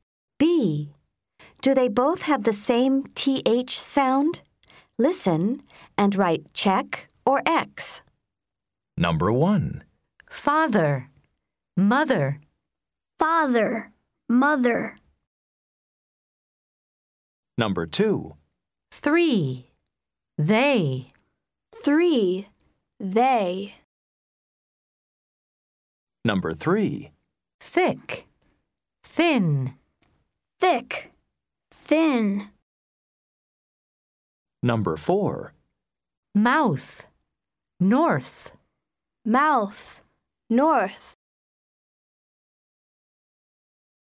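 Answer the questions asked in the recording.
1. Yes (check)
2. No (X)
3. Yes (check)
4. Yes (check)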